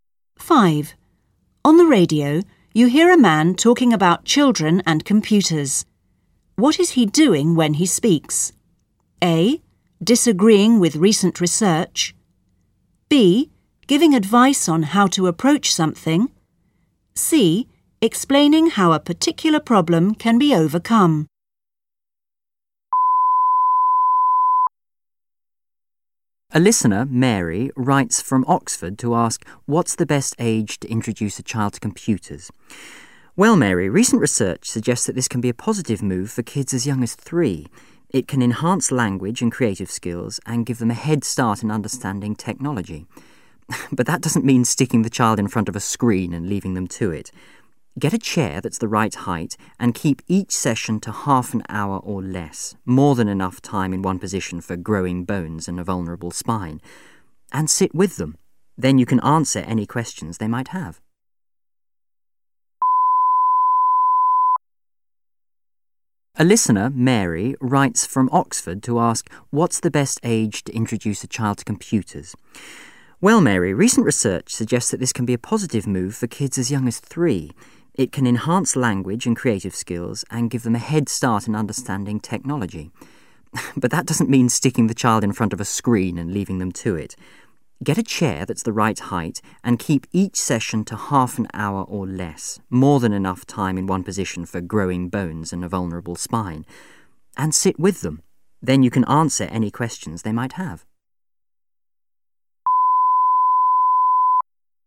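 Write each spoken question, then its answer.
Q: What is he doing when he speaks?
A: B: Giving advice on how to approach something.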